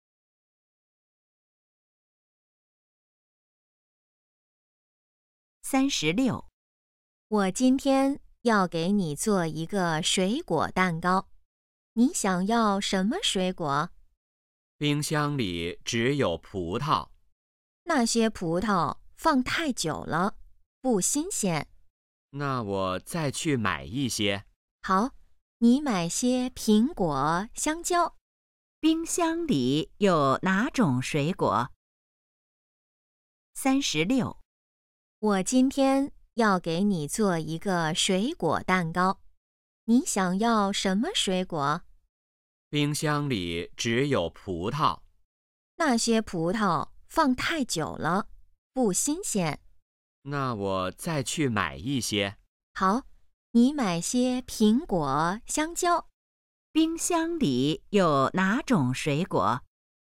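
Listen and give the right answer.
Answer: 葡萄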